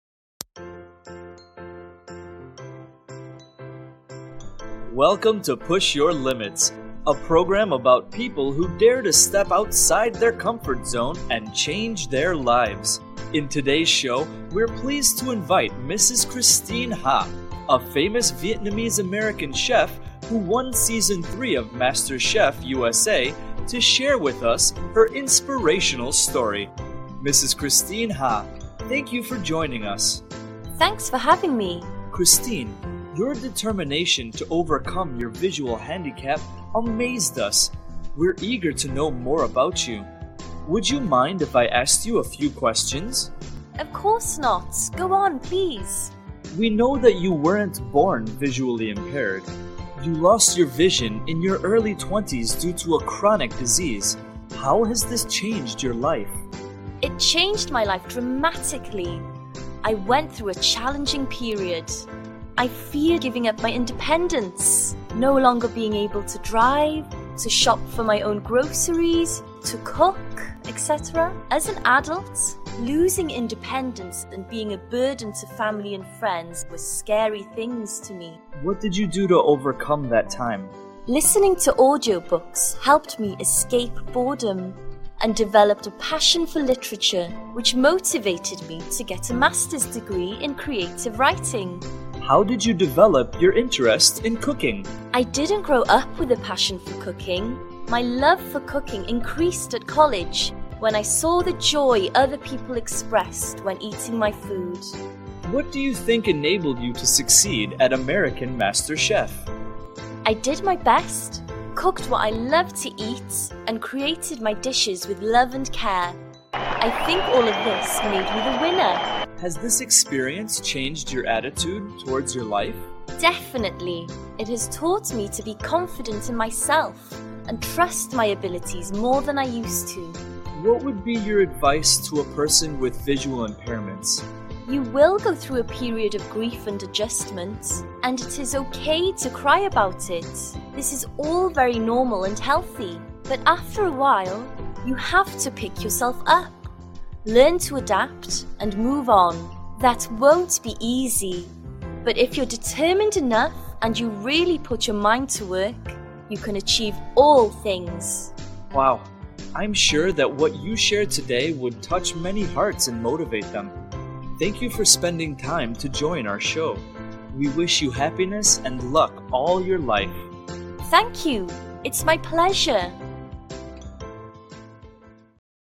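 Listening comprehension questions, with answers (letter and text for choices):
Task: Choose the correct answer.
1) Christine Ha lost her vision because of:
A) An accident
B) A chronic disease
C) A genetic condition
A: B) A chronic disease

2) What helped her overcome boredom?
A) Reading books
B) Listening to audiobooks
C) Cooking with friends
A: B) Listening to audiobooks

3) What did she study after losing her sight?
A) Literature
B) Physics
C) Culinary arts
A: A) Literature

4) What helped her succeed in MasterChef?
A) Cooking with love and care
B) Learning professional techniques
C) Following others' recipes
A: A) Cooking with love and care

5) What is her message for people with disabilities?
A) Crying is useless.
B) It's okay to cry, but then move on.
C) Always depend on others.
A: B) It's okay to cry, but then move on.

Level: lớp 11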